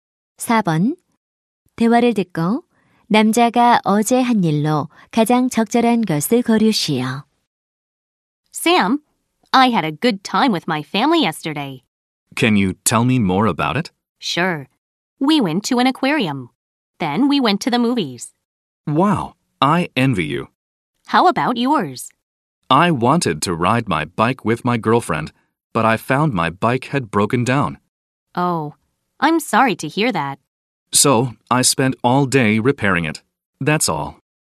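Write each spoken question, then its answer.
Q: 대화를 듣고 남자가 어제 한 일로 가장 적절한 것을 고르시오.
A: 고장 난 자전거 수리하기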